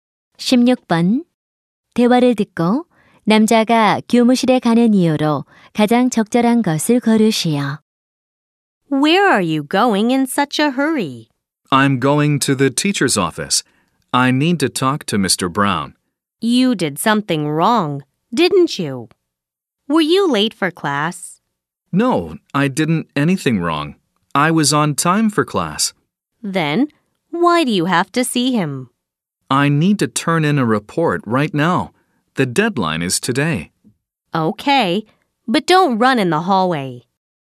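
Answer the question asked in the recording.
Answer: 보고서를 제출하기 위해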